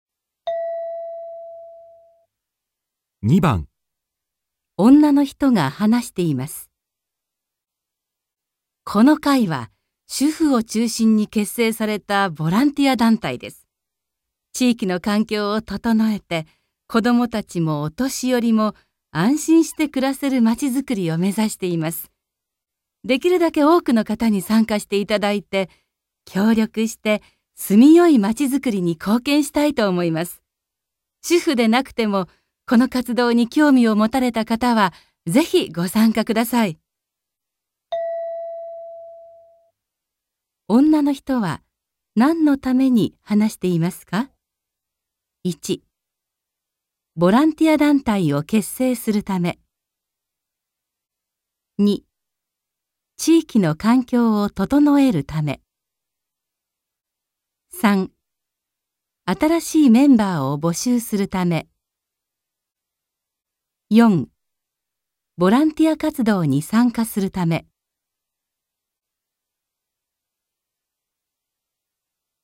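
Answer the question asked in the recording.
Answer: 新しいメンバーを募集するため

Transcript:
主婦でなくても、この活動に興味を持たれた方はぜひご参加ください。
女の人は何について話していますか。
1.ボランティア団体を結成するため
2.地域の環境を整えるため
3.新しいメンバーを募集するため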